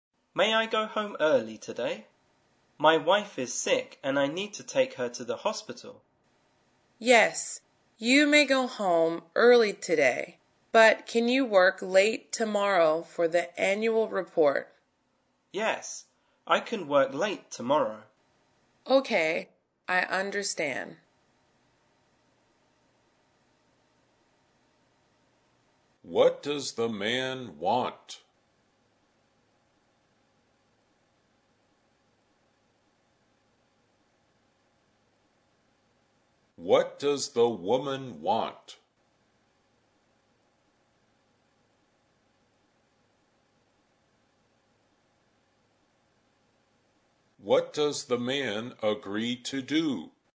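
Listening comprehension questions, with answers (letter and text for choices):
Directions: In this part of the test, you will hear conversations between two speakers.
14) What does the man want?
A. To ride the bus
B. To buy a home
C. To leave early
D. To eat lunch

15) What does the woman want?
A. The man's help tomorrow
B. A party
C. To go home early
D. Medicine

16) What does the man agree to do?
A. Get medicine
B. Work late tomorrow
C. Drink water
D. Eat sushi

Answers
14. C. To leave early
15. A. The man's help tomorrow
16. B. Work late tomorrow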